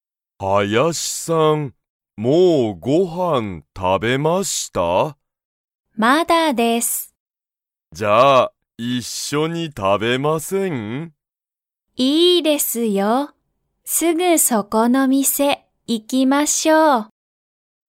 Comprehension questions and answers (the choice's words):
村田(むらた)さんと林(はやし)さんは、____店(みせ)に行(い)く。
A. 新(あたら)しい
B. すぐそこの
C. よく行(い)く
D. この前(まえ)の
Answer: すぐそこの

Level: Level 1